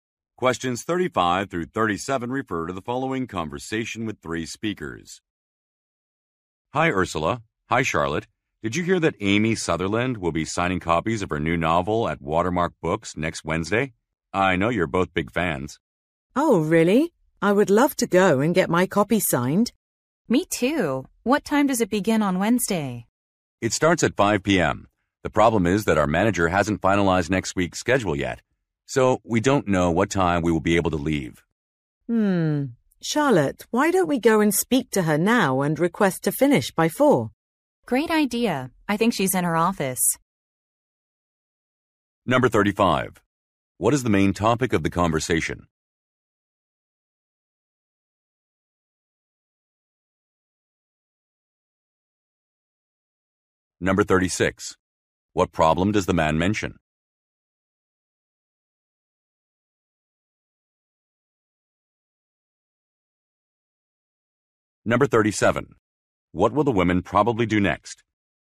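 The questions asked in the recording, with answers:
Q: What is the main topic of the conversation?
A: Amy Sutherland's book signing at Watermark Books

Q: What problem does the man mention?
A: The manager hasn't finalized next week's schedule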